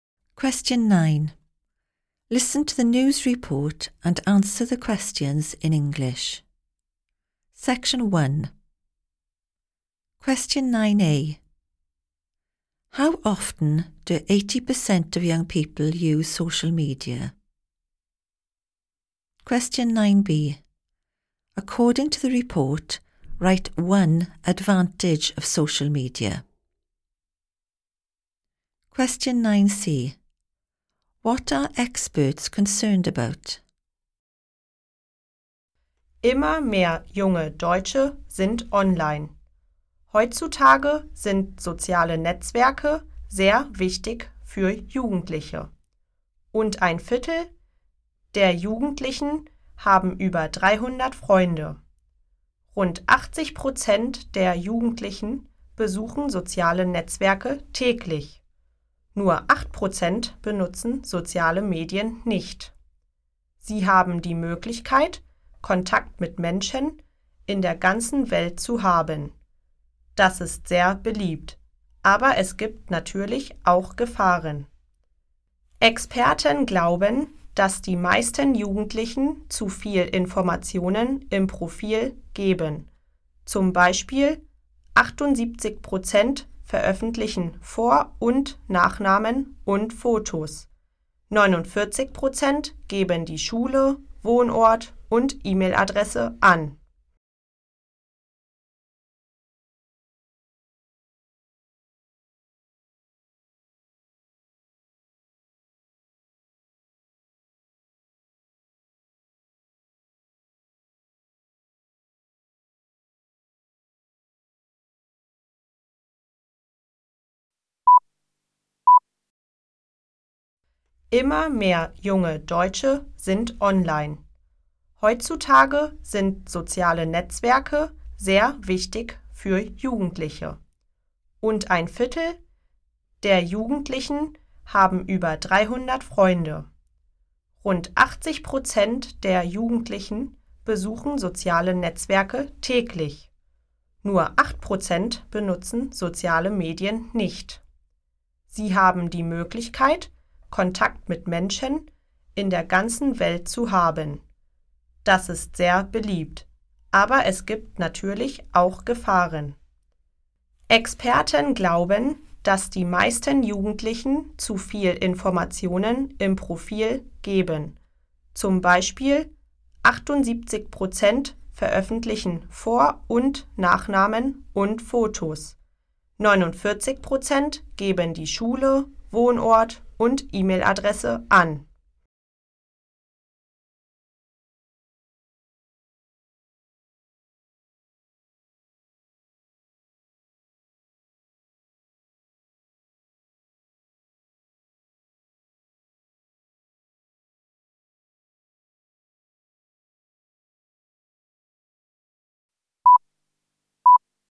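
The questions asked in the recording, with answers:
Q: How often do 80% of young people use social media?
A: Daily

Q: According to the report, write one advantage of social media.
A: Contact with people all over the world

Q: What are experts concerned about?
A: Young people give too much information in their profiles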